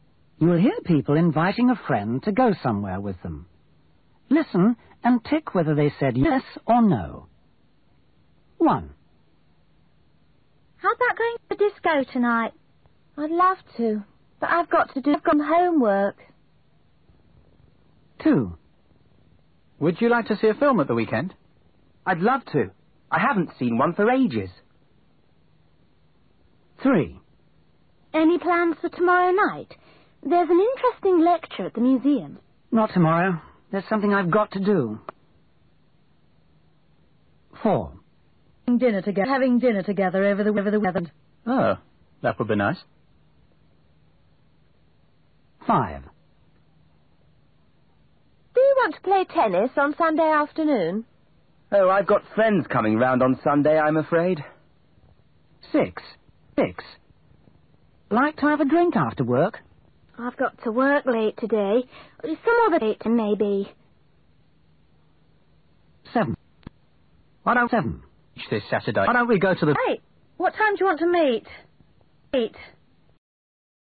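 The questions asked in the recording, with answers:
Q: Listen and tick whether they said yes or no.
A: No

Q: Listen and tick whether they said yes or no.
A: Yes

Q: Listen and tick whether they said yes or no.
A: No

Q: Listen and tick whether they said yes or no.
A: Yes

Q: Listen and tick whether they said yes or no.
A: No

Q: Listen and tick whether they said yes or no.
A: No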